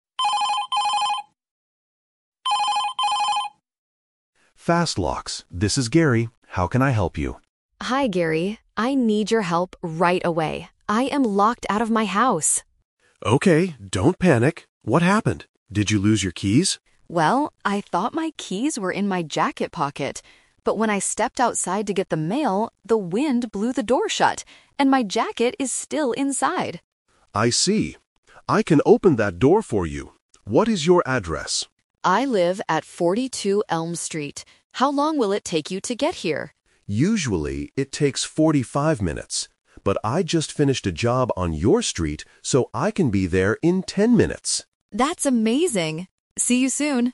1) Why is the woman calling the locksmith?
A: She cannot open the door to her house.

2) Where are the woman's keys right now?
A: Inside her jacket in the house.

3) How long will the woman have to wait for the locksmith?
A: 10 minutes.

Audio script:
Locksmith: Fast Locks, this is Gary. How can I help you?
Homeowner: Hi Gary. I need your help right away. I am locked out of my house.
Locksmith: Okay, don't panic. What happened? Did you lose your keys?
Homeowner: Well, I thought my keys were in my jacket pocket. But when I stepped outside to get the mail, the wind blew the door shut. And my jacket is still inside!
Locksmith: I see. I can open that door for you. What is your address?
Homeowner: I live at 42 Elm Street. How long will it take you to get here?
Locksmith: Usually, it takes 45 minutes. But I just finished a job on your street, so I can be there in 10 minutes.